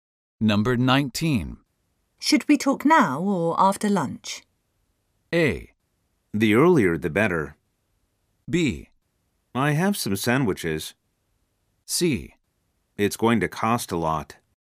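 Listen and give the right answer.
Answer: A: The earlier the better.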